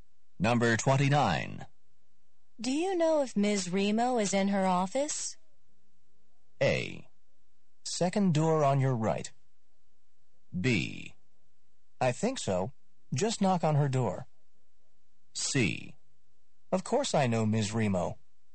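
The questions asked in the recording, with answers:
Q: Do you know if Ms. Remo is in her office?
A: B: I think so. Just knock on her door.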